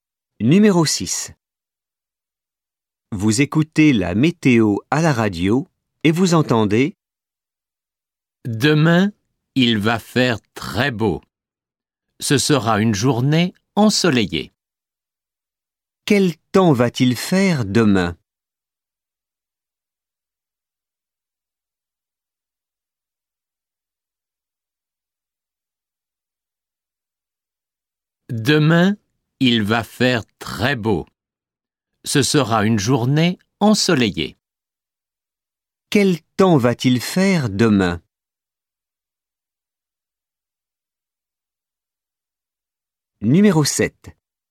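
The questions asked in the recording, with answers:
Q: Quel temps va-t-il faire demain?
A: Il va faire beau, ensoleillé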